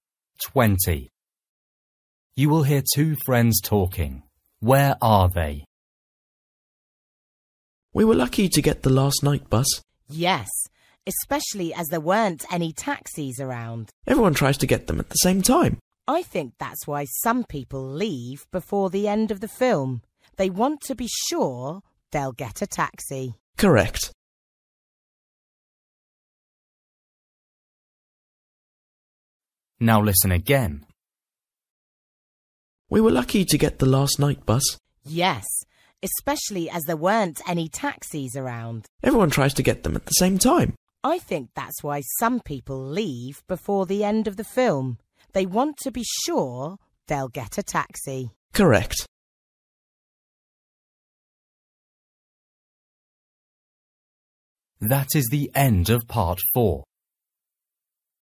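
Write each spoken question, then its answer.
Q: Where are they?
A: On the night bus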